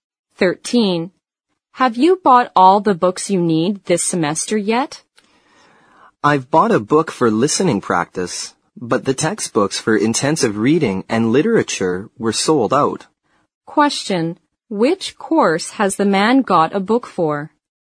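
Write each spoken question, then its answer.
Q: Which course has the man got a book for?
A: Listening practice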